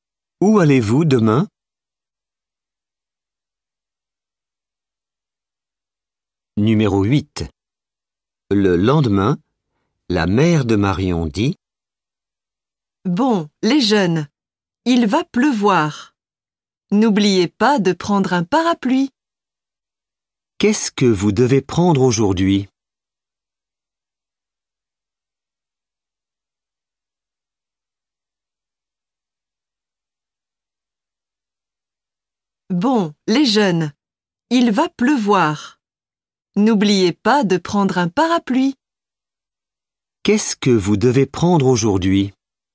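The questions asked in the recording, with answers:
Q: Qu'est-ce que vous devez prendre aujourd'hui?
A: Un parapluie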